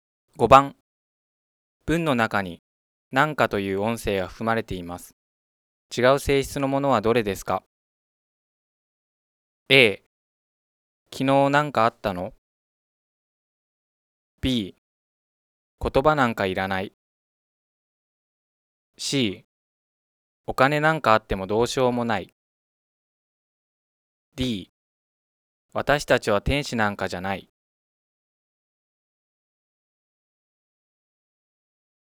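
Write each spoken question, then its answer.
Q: 違う性質のものはどれですか?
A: A: 昨日なんかあったの?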